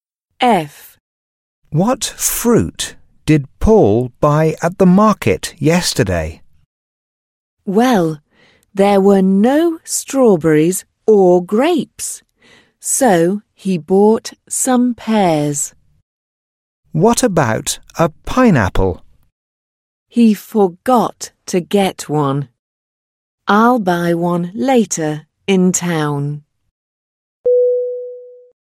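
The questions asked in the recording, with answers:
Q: What fruit did Paul buy at the market yesterday?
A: Pears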